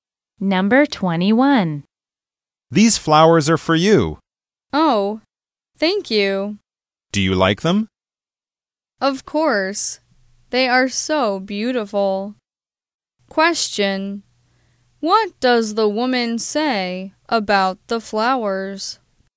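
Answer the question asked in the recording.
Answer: They are so beautiful.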